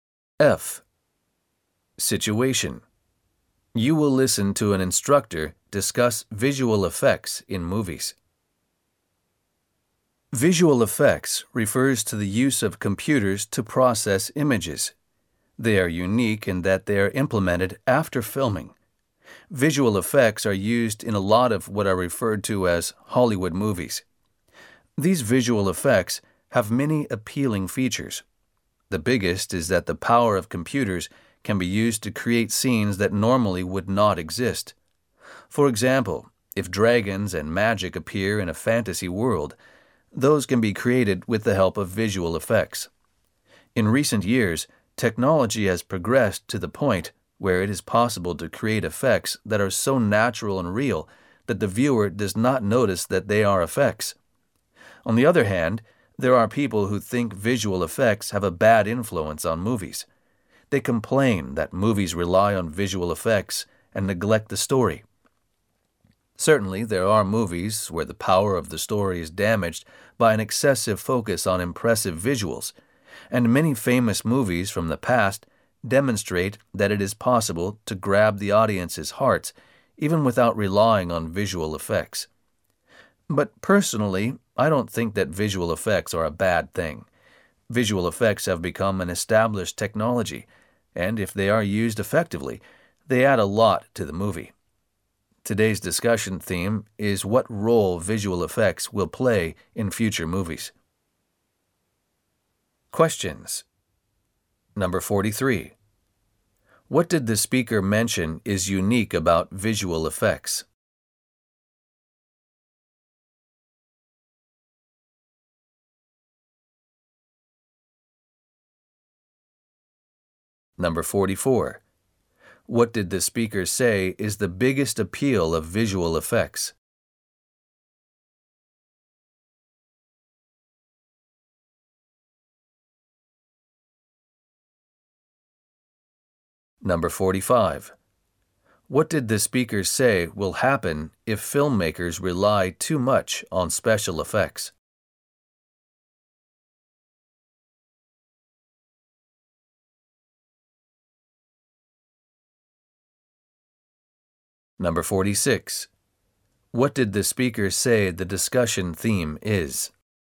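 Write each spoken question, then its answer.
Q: What did the speaker mention is unique about visual effects?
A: They are implemented after filming

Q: What did the speaker say is the biggest appeal of visual effects?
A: Computers can create scenes that normally would not exist

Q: What did the speaker say will happen if filmmakers rely too much on special effects?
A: The story is neglected and its power damaged

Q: What did the speaker say the discussion theme is?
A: What role visual effects will play in future movies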